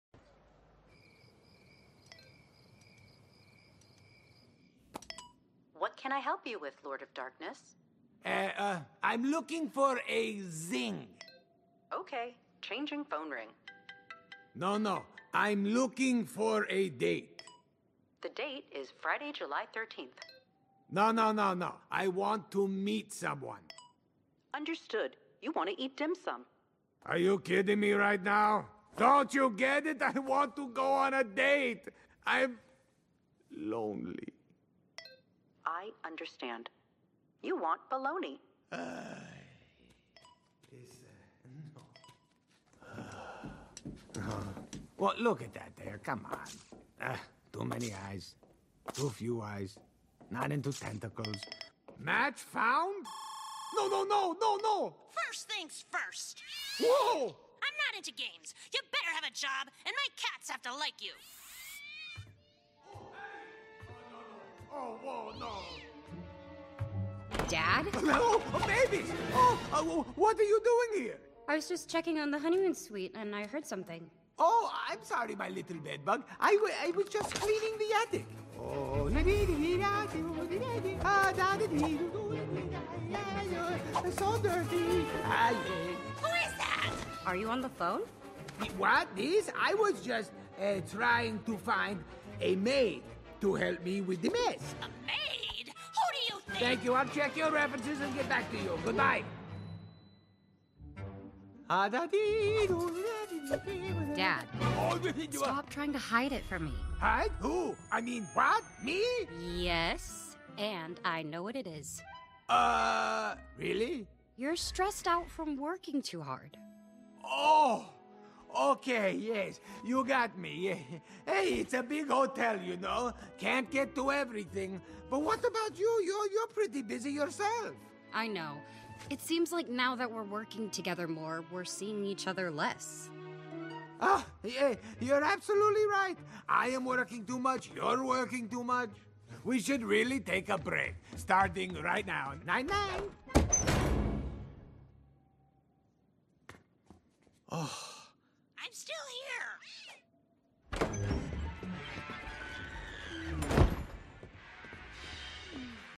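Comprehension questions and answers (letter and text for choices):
Прослушайте аудиоотрывок из мультфильма Hotel Transylvania 3: Summer Vacation («Монстры на каникулах 3: Море зовет») и ответьте на вопросы.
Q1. What does Dracula want to do?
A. He wants to meet someone.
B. He wants to eat dim sum.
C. He wants to check today's date.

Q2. Who is Dracula looking for?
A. He's looking for a date.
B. He's looking for a maid.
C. He's looking for a wife.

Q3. How is Dracula feeling?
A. He's feeling sad and lonely.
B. He's feeling happy.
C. He's feeling tired.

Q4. Why doesn't Dracula like the women on the app?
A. They have too few or too many eyes.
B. They are too old.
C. They are too fat.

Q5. Which fact about the last woman on the app is false?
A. She likes games.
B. She doesn't want a person who doesn't work.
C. She has a lot of cats.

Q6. Who is Mavis (the girl who came into the room)?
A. She is Dracula's daughter.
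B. She is Dracula's granddaughter.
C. She is Dracula's maid.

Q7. What does Dracula say to Mavis?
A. He says that he is cleaning the room.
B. He says that he is talking to his girlfriend.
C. He says that he is looking for a job.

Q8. Does Mavis know what is wrong with Dracula?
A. No, she thinks that he is working too much.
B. Yes, he is stressed out from hard work.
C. Yes, she understands that he needs a girlfriend.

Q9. Which fact about Mavis is true?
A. She is working together with Dracula.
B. She doesn't want to be together with her family.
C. She wants to find a new job.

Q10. What do they all need to do?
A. They need to take a break from work and be together.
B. They need to see each other less.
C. They need to work more.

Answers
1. A. He wants to meet someone.
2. A. He's looking for a date.
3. A. He's feeling sad and lonely.
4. A. They have too few or too many eyes.
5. A. She likes games.
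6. A. She is Dracula's daughter.
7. A. He says that he is cleaning the room.
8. A. No, she thinks that he is working too much.
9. A. She is working together with Dracula.
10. A. They need to take a break from work and be together.

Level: Elementary (A1)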